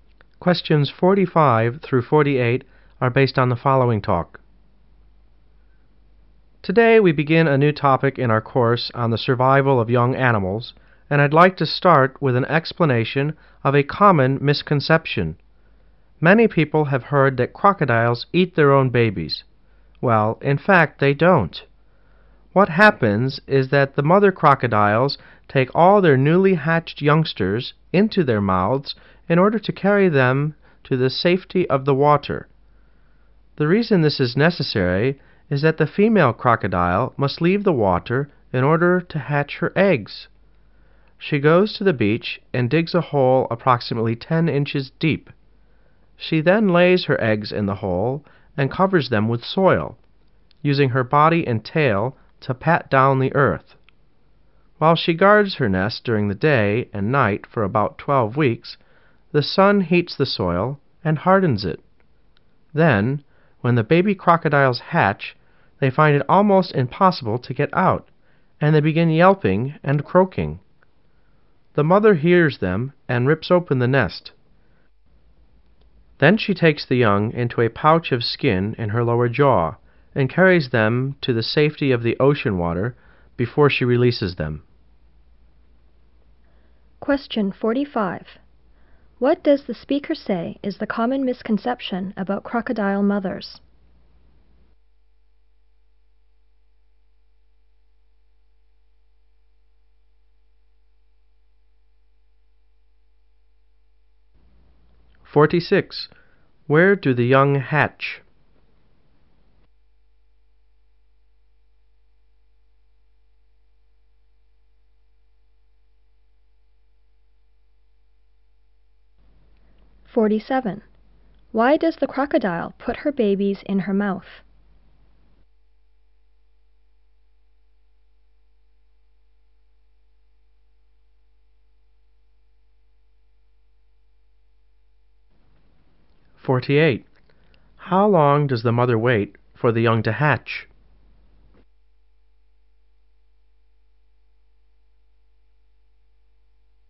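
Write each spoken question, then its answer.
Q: What does the speaker say is the common misconception about crocodile mothers?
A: That they eat their own babies

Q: Where do the young hatch?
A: In a nest dug in the beach

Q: Why does the crocodile put her babies in her mouth?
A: To carry them to the safety of the water

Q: How long does the mother wait for the young to hatch?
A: About 12 weeks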